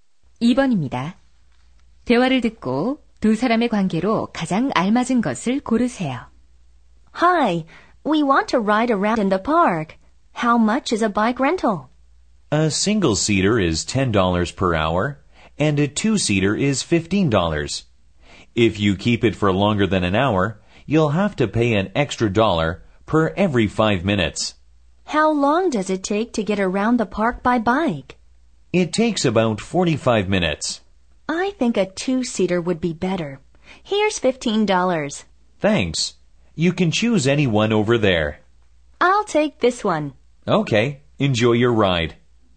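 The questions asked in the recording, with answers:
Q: 대화를 듣고 두 사람의 관계로 가장 알맞은 것을 고르세요.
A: 자전거 대여점 직원과 손님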